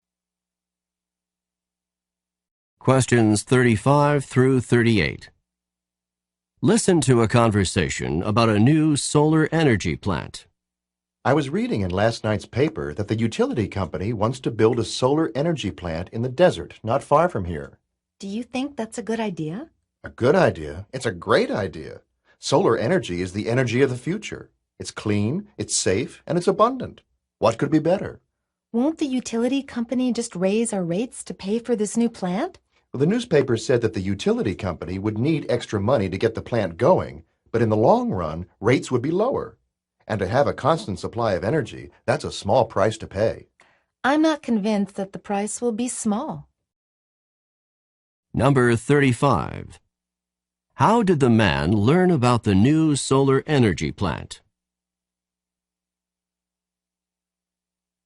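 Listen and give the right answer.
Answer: He read about it in the newspaper.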